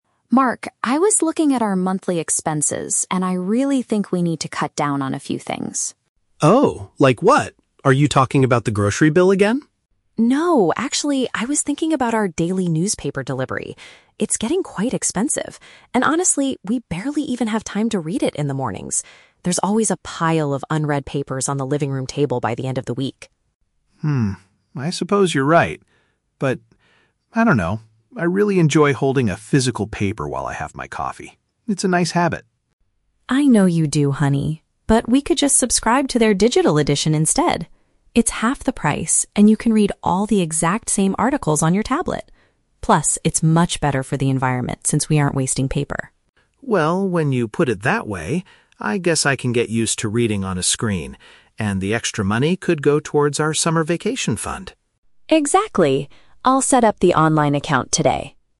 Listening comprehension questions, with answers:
Listen to a conversation between a husband and wife. Choose the correct answer (A, B, or C) for each question.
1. Why does the woman want to cancel the newspaper delivery?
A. She thinks they are spending too much money on groceries.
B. She believes the print version is costly and often goes unread.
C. She is annoyed by the delivery person arriving too early.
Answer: She believes the print version is costly and often goes unread.

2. How does the man initially feel about the physical newspaper?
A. He enjoys the traditional experience of holding it.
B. He wants to stop buying it to protect the environment.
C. He usually throws it away at the end of the week.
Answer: He enjoys the traditional experience of holding it.

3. What is their final decision?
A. To stop reading the news entirely to save for a holiday.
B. To buy a brand new tablet for reading the news.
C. To switch to a cheaper electronic subscription.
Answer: To switch to a cheaper electronic subscription.

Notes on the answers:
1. Emma states that the delivery is "getting quite expensive" (costly) and they "barely even have time to read it" (often goes unread). Option A is the Trap: Mark asks if she is talking about the "grocery bill", but she immediately says "No". Option C is plausible in real life but is never mentioned in the audio.
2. Mark says he really enjoys "holding a physical paper" while having his coffee. Option B is the Trap: Protecting the "environment" is mentioned, but that is Emma's point, not Mark's initial feeling. Option C is also a Trap: Emma mentions a "pile of unread papers", but Mark does not say he throws them away.
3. They agree to subscribe to the "digital edition" which is "half the price" (a cheaper electronic subscription). Option A is the Trap: Mark mentions the "summer vacation fund" (holiday), but they are not stopping the news entirely; they are just changing how they read it. Option B is incorrect: Emma mentions reading on a tablet, but they do not discuss buying a new one.

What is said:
Emma: Mark, I was looking at our monthly expenses, and I really think we need to cut down on a few things.
Mark: Oh? Like what? Are you talking about the grocery bill again?
Emma: No, actually, I was thinking about our daily newspaper delivery. It's getting quite expensive, and honestly, we barely even have time to read it in the mornings. There's always a pile of unread papers on the living room table by the end of the week.
Mark: Hmm, I suppose you're right. But... I don't know, I really enjoy holding a physical paper while I have my coffee. It's a nice habit.
Emma: I know you do, honey. But we could just subscribe to their digital edition instead. It's half the price, and you can read all the exact same articles on your tablet. Plus, it's much better for the environment since we aren't wasting paper.
Mark: Well, when you put it that way... I guess I can get used to reading on a screen. And the extra money could go towards our summer vacation fund.
Emma: Exactly! I'll set up the online account today.

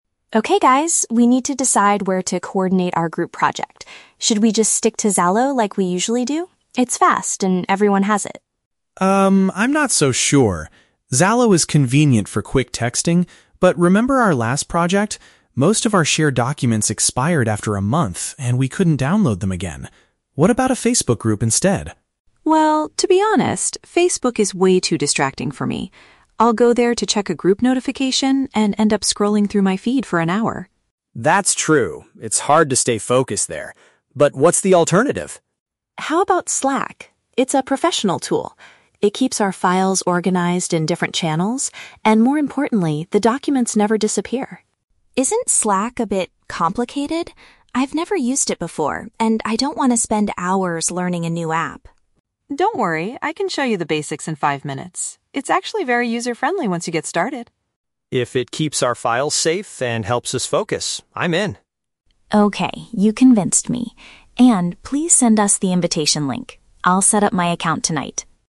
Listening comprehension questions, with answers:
Listen to a conversation among three students. For each question, choose the correct answer (A, B, or C).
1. Why does Minh have a negative opinion of using Zalo for the project?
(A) He thinks the application is too slow to send messages.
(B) He is worried about losing access to important files.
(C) He finds it difficult to create a group chat on that platform.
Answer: He is worried about losing access to important files.

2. What is An's main concern regarding Facebook Groups?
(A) It is easy to get sidetracked by other content.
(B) Not all group members have a Facebook account.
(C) The platform charges a fee for sharing large documents.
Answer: It is easy to get sidetracked by other content.

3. Which platform do the students finally agree to use?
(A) A common app they have used many times before.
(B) A professional tool that might be new to some members.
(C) A social media site that is popular for entertainment.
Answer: A professional tool that might be new to some members.

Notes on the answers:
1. Minh mentions that in their last project, "documents expired after a month" and they couldn't download them again. This matches "losing access to important files." Option (A) is a trap; Linh says Zalo is "fast," and Minh doesn't disagree with the speed.
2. An says Facebook is "way too distracting" and she ends up "scrolling through my feed," which means getting sidetracked. Option (B) and (C) are not mentioned in the audio.
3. They agree to use Slack, which An describes as a "professional tool." Linh mentions she has "never used it before," confirming it is new to her. Option (A) is a trap; they rejected Zalo (the common app). Option (C) is a trap; they rejected Facebook.

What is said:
Linh: Okay guys, we need to decide where to coordinate our group project. Should we just stick to Zalo like we usually do? It's fast and everyone has it.
Minh: Um, I'm not so sure. Zalo is convenient for quick texting, but remember our last project? Most of our shared documents expired after a month, and we couldn't download them again. What about a Facebook Group instead?
An: Well, to be honest, Facebook is way too distracting for me. I'll go there to check a group notification and end up scrolling through my feed for an hour.
Minh: That's true, it's hard to stay focused there. But what's the alternative?
An: How about Slack? It's a professional tool. It keeps our files organized in different channels, and more importantly, the documents never disappear.
Linh: Isn't Slack a bit... complicated? I've never used it before and I don't want to spend hours learning a new app.
An: Don't worry, I can show you the basics in five minutes. It's actually very user-friendly once you get started.
Minh: If it keeps our files safe and helps us focus, I'm in.
Linh: Okay, you convinced me. An, please send us the invitation link. I'll set up my account tonight.

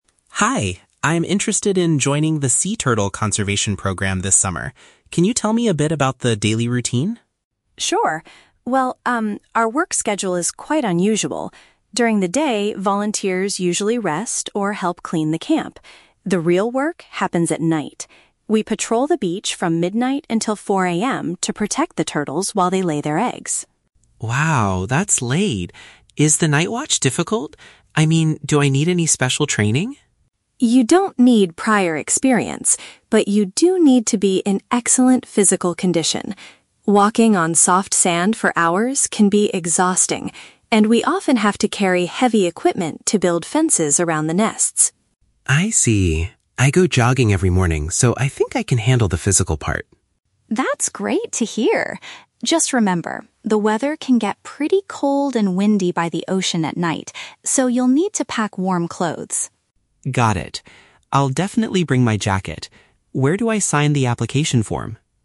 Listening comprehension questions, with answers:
Listen to a conversation between a potential volunteer and a camp coordinator. Choose the correct answer (A, B, or C) for each question.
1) What is the main responsibility of the volunteers during the nighttime?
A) They clean up the rubbish around the living area.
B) They walk along the coast to keep the nesting animals safe.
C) They attend special training classes about marine life.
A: They walk along the coast to keep the nesting animals safe.

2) Why does the coordinator state that volunteers must be physically fit?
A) Because they have to run on the beach early every morning.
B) Because they must swim in the ocean to rescue injured turtles.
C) Because moving materials and walking on the sand is very tiring.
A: Because moving materials and walking on the sand is very tiring.

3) What does Rachel advise Chris to bring from home?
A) Clothes that will protect him from the chilly weather.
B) Heavy tools to help construct wooden fences.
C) A waterproof flashlight to see clearly in the dark.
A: Clothes that will protect him from the chilly weather.

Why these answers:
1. Rachel says that at night, they "patrol the beach... to protect the turtles while they lay their eggs". "Patrol the beach" is paraphrased as "walk along the coast", and "protect the turtles" is "keep the nesting animals safe".
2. Rachel explains that "walking on soft sand... can be exhausting" and they have to "carry heavy equipment". "Exhausting" is paraphrased as "very tiring", and "equipment" is paraphrased as "materials".

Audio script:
Chris: Hi, I'm interested in joining the sea turtle conservation program this summer. Can you tell me a bit about the daily routine?
Rachel: Sure! Well, um, our work schedule is quite unusual. During the day, volunteers usually rest or help clean the camp. The real work happens at night. We patrol the beach from midnight until 4 AM to protect the turtles while they lay their eggs.
Chris: Wow, that's late! Is the night watch difficult? I mean, do I need any special training?
Rachel: You don't need prior experience, but you do need to be in excellent physical condition. Walking on soft sand for hours can be exhausting, and we often have to carry heavy equipment to build fences around the nests.
Chris: I see. I go jogging every morning, so I think I can handle the physical part.
Rachel: That's great to hear. Just remember, the weather can get pretty cold and windy by the ocean at night, so you'll need to pack warm clothes.
Chris: Got it. I'll definitely bring my jacket. Where do I sign the application form?

